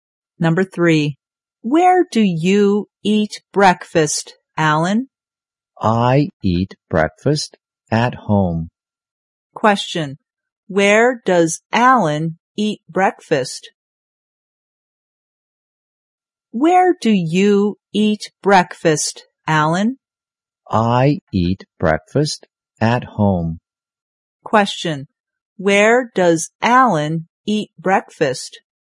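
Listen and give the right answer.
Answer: At home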